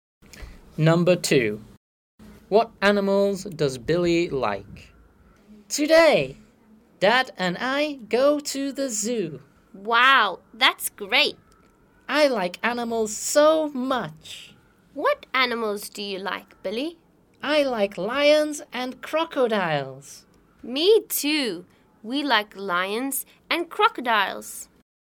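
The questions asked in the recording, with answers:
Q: What animals does Billy like?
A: lions and crocodiles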